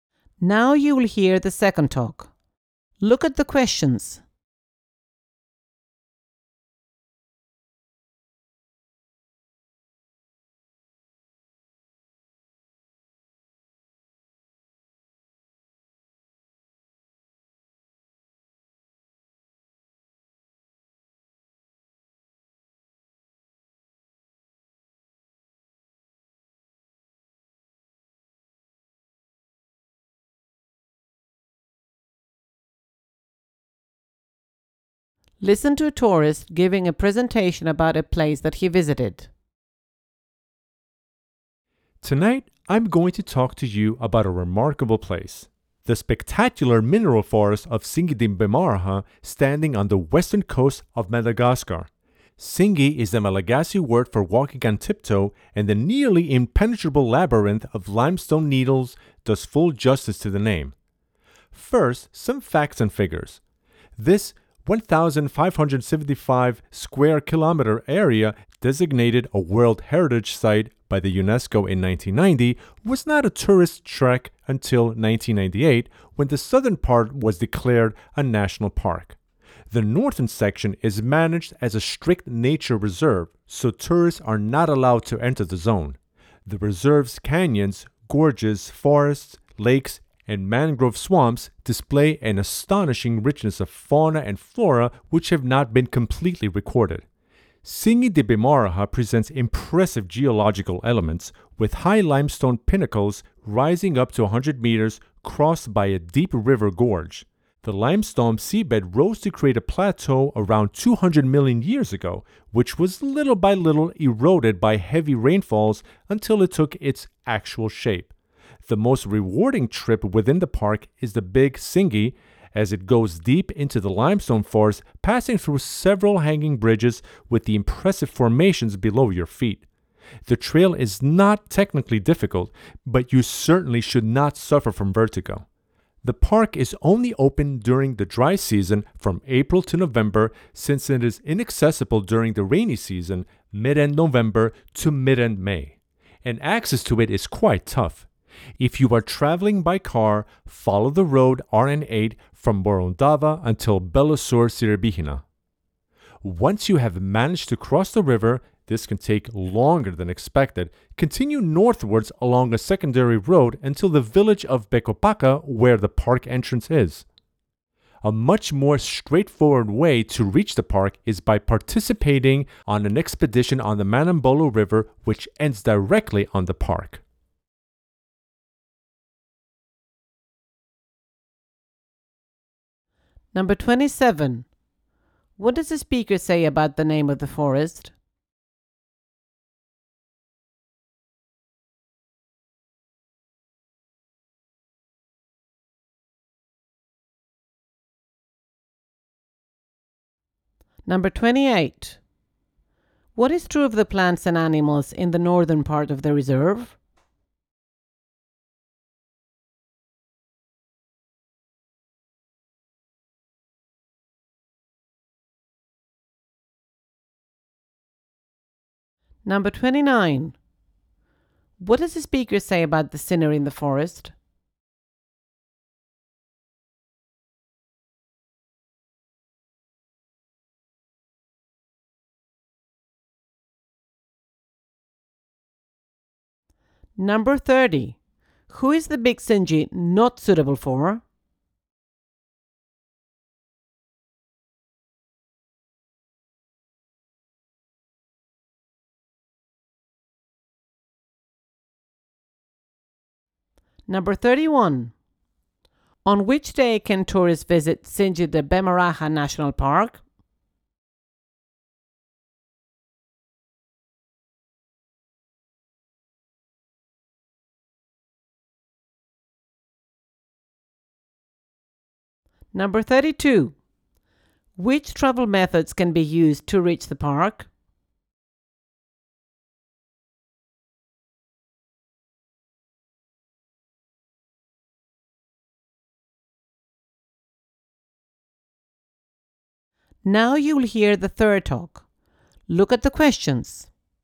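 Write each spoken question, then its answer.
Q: What does the speaker say about the name of the forest?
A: It means walking on tiptoe, which suits the labyrinth of limestone needles

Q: Who is the Big Singi not suitable for?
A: People who suffer from vertigo

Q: Which travel methods can be used to reach the park?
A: By car or by an expedition on the Manambolo River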